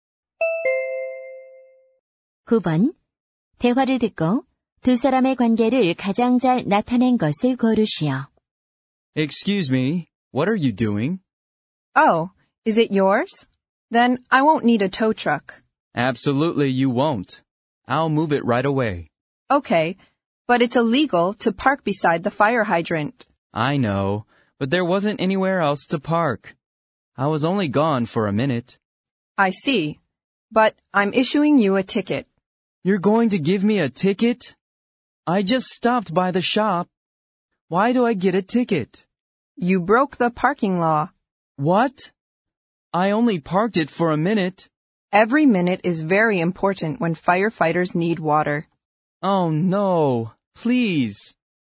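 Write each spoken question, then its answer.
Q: 두 사람의 관계를 가장 잘 나타낸 것을 고르시오.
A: 주차 단속원 - 운전자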